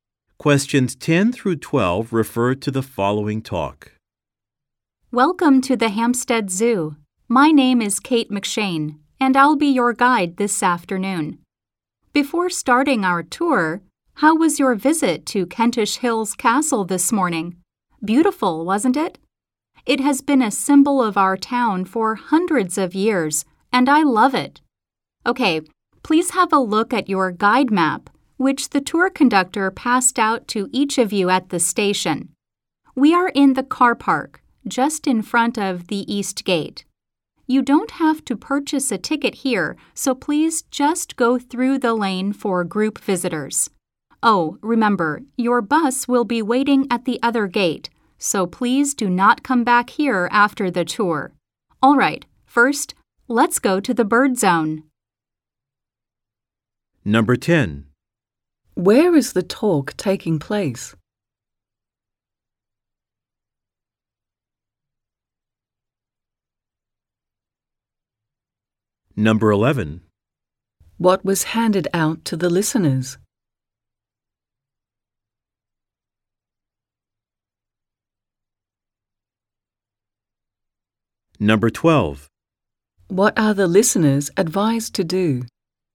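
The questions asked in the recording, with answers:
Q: Where is the talk taking place?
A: At the Hampstead Zoo (in the car park by the East Gate)

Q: What was handed out to the listeners?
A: A guide map

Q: What are the listeners advised to do?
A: Go to the other gate after the tour, where the bus will be waiting, and not come back here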